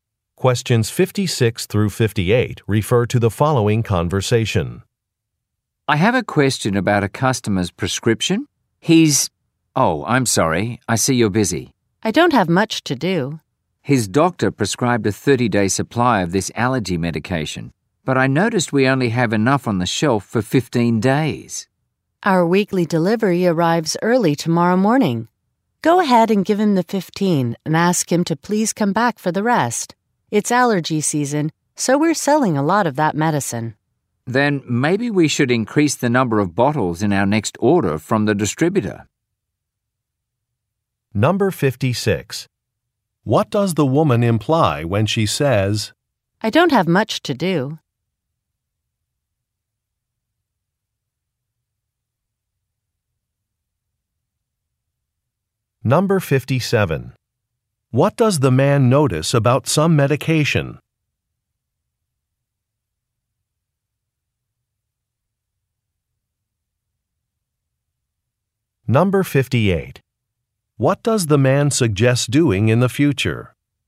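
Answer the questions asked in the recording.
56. She has time to help
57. There is not enough of it in stock
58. Ordering more bottles from the distributor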